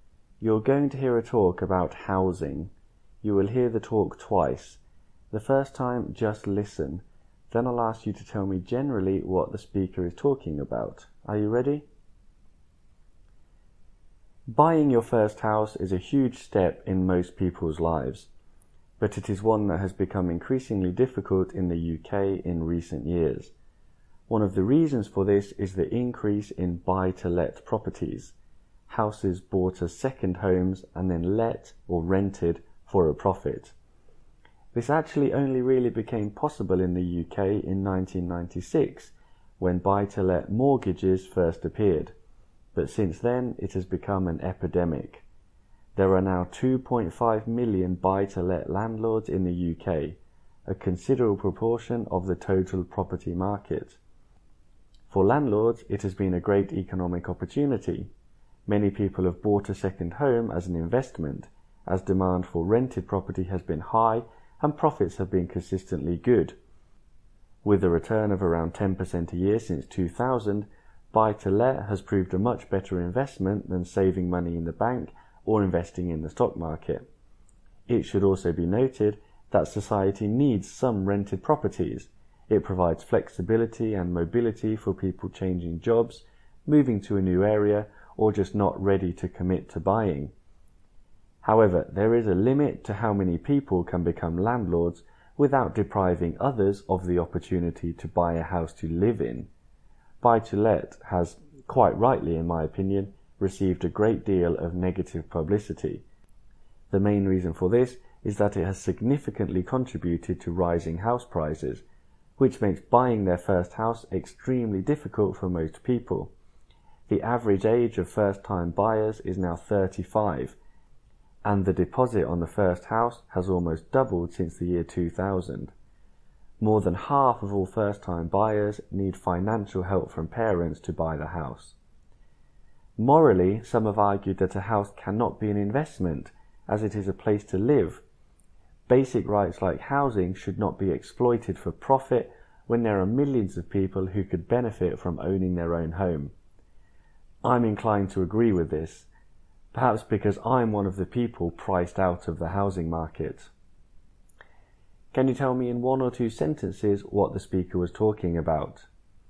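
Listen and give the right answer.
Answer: How buy-to-let properties have made buying a first house difficult in the UK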